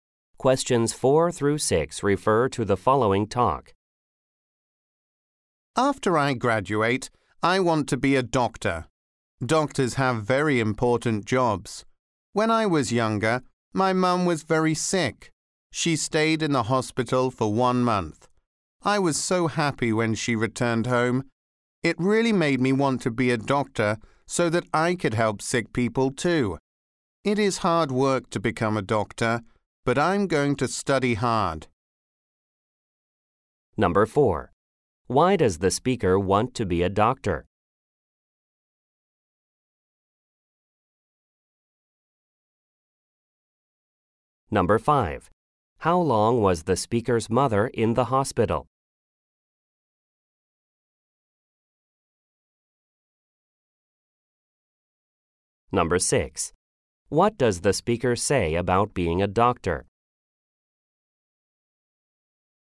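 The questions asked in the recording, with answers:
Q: Why does the speaker want to be a doctor?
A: To help sick people, because the speaker's mum was very sick

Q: How long was the speaker's mother in the hospital?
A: 1 month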